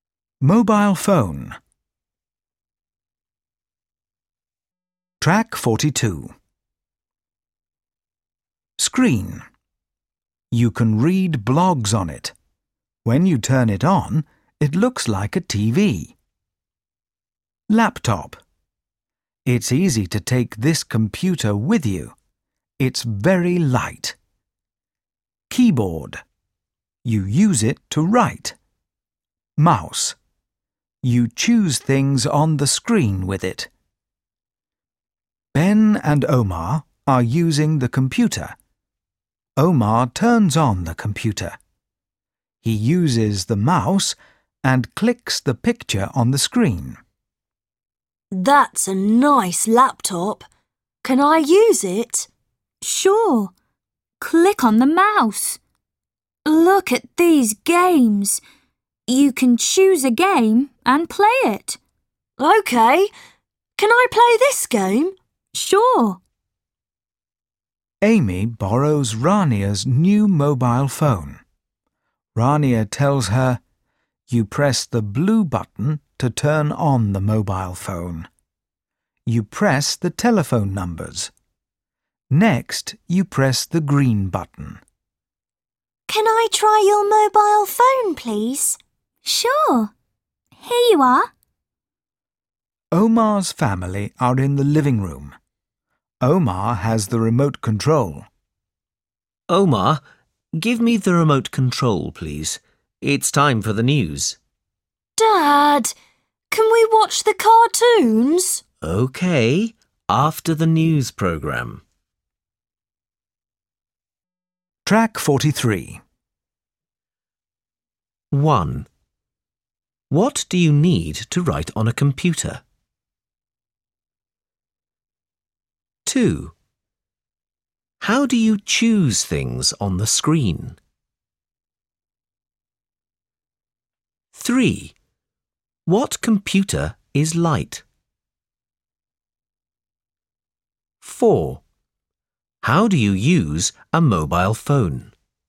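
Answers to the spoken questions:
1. A keyboard
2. With the mouse
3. A laptop
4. Press the blue button to turn it on, press the numbers, then press the green button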